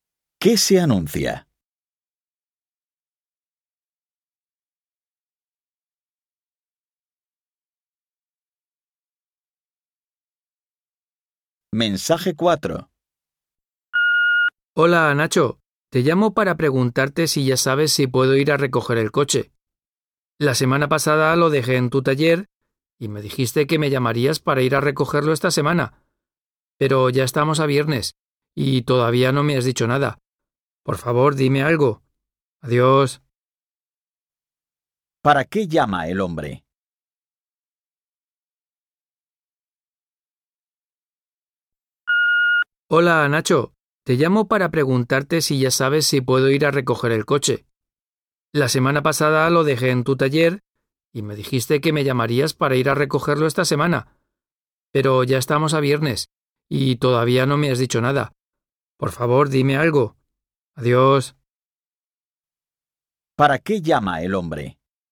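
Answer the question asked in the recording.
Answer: Para preguntar si puede recoger el coche del taller.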